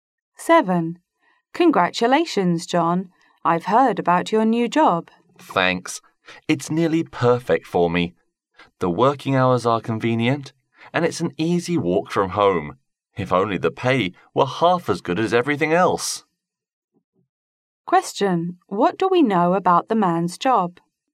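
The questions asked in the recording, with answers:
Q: What do we know about the man's job?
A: The pay is poor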